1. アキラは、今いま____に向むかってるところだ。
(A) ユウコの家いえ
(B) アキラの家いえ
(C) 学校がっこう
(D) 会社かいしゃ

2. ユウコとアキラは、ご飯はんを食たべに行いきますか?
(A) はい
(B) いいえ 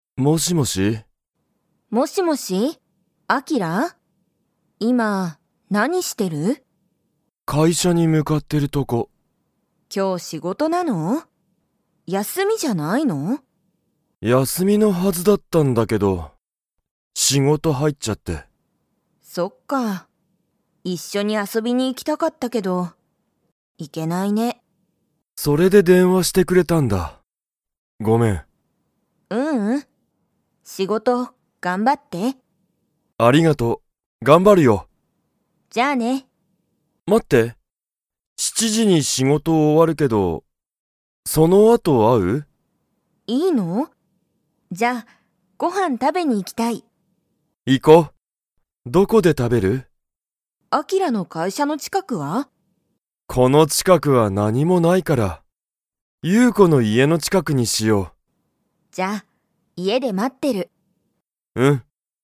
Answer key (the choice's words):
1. 会社かいしゃ
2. はい

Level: Level 2